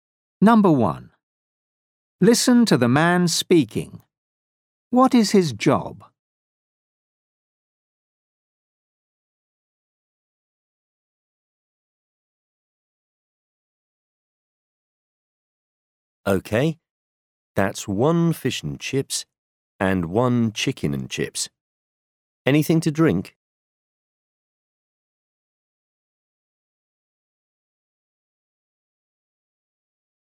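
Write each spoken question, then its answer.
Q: What is his job?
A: waiter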